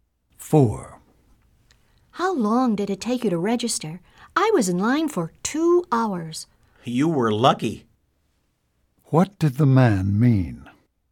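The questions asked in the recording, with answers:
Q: What did the man mean?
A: Registration usually takes longer than 2 hours.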